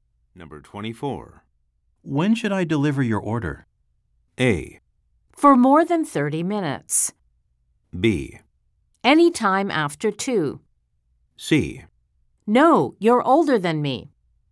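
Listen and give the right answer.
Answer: B: Any time after 2.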